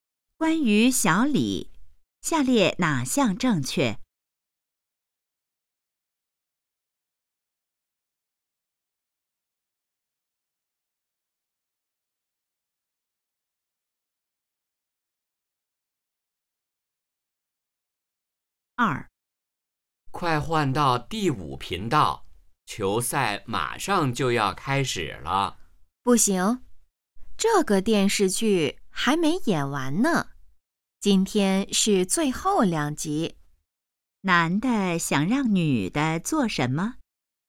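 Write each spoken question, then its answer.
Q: 男的想让女的做什么?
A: 换到第5频道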